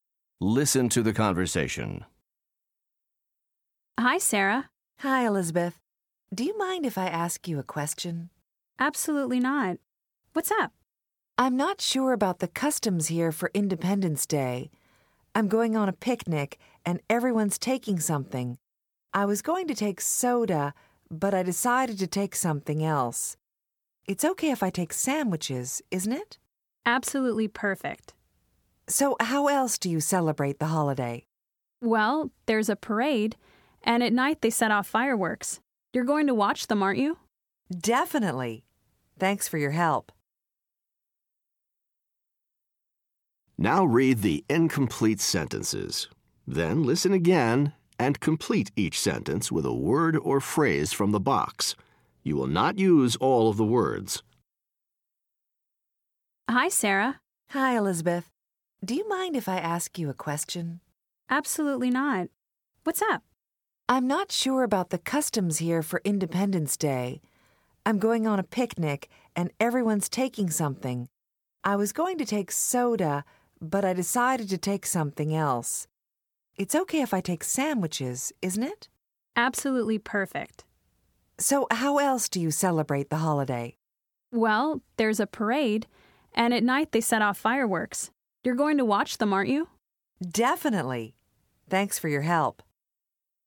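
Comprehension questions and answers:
Listen to the conversation. Write the words and phrases to complete each sentence. Not all the choices will be used.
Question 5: Sarah is going to a on Independence Day.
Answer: picnic

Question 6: At first, Sarah take soda to the picnic.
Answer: was going to

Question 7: Elizabeth says it's fine to take to the picnic.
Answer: sandwiches

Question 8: Elizabeth says that there is a that people watch.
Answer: parade

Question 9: Sarah plans to watch at night.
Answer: fireworks

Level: Top Notch 3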